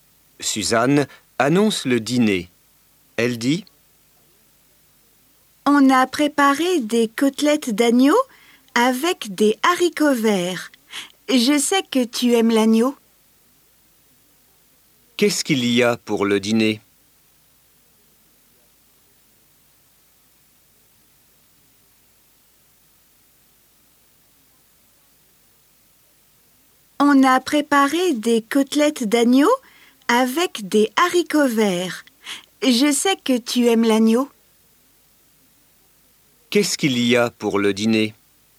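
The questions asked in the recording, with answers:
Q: Qu'est-ce qu'il y a pour le dîner?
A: Des côtelettes d'agneau avec des haricots verts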